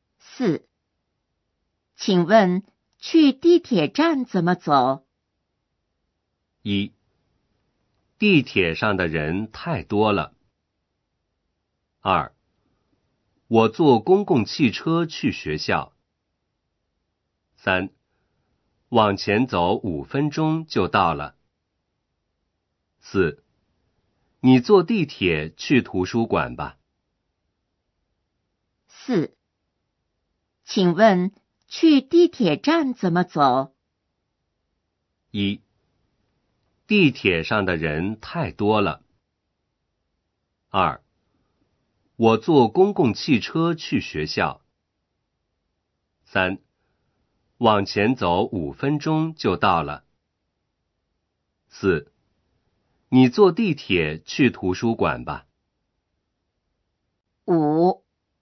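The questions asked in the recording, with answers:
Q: 请问去地铁站怎么走?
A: 3: 往前走5分钟就到了。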